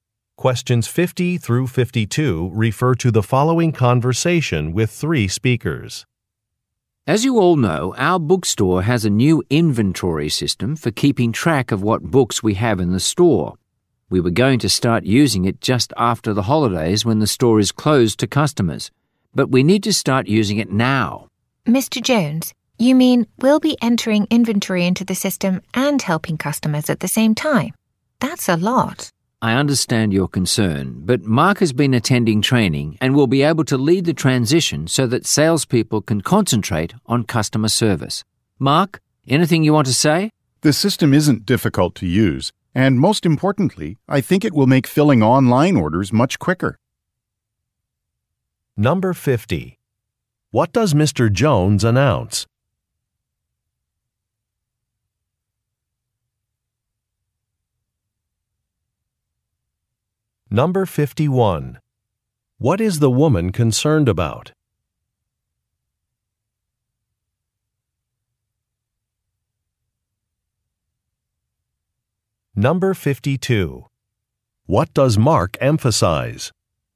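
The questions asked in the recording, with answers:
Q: What does Mr. Jones announce?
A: The new inventory system will be used now

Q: What is the woman concerned about?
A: Doing inventory and helping customers at the same time

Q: What does Mark emphasize?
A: It will make filling online orders quicker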